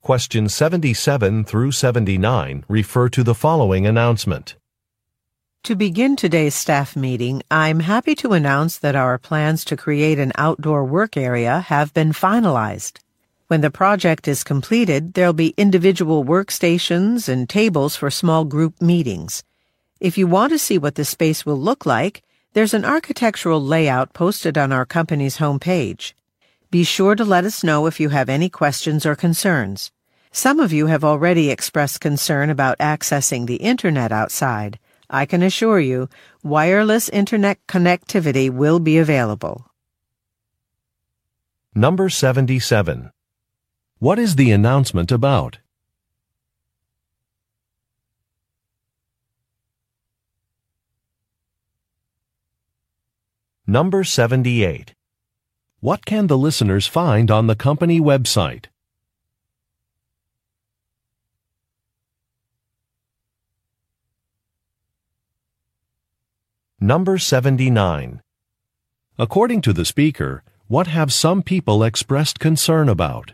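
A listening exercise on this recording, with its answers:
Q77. What is the announcement about?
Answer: An outdoor work space

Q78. What can the listeners find on the company Web site?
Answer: An architectural plan

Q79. According to the speaker, what have some people expressed concern about?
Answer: Internet connectivity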